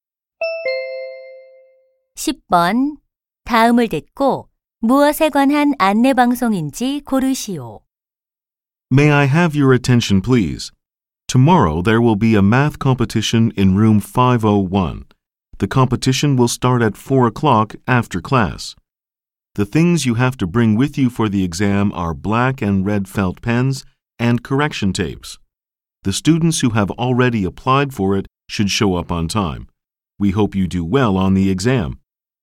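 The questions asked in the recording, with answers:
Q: 다음을 듣고 무엇에 관한 안내 방송인지 고르시오.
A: 수학 경시대회 안내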